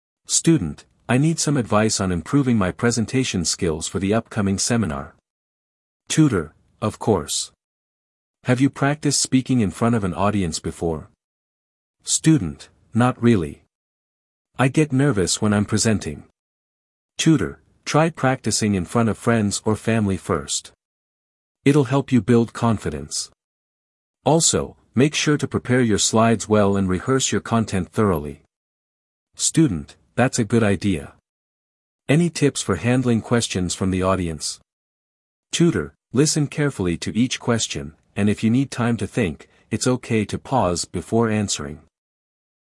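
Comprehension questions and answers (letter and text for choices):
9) What is the student seeking help with?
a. Writing a seminar paper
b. Improving presentation skills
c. Designing better slides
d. Managing time during the seminar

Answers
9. b. Improving presentation skills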